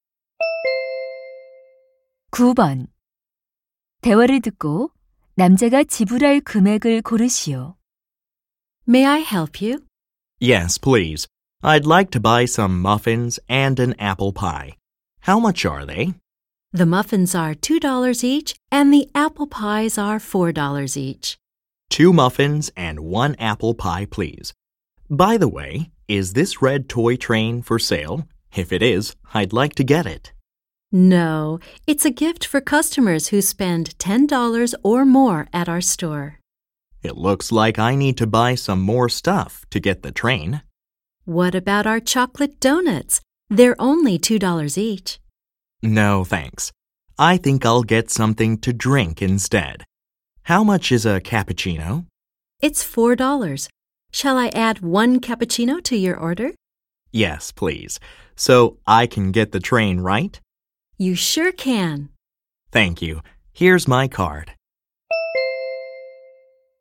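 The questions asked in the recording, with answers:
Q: 대화를 듣고 남자가 지불할 금액을 고르시오.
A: 12달러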